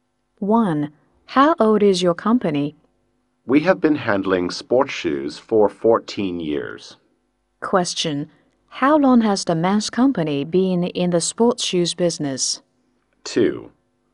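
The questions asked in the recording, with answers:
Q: How long has the men's company been in the sports shoes business?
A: 14 years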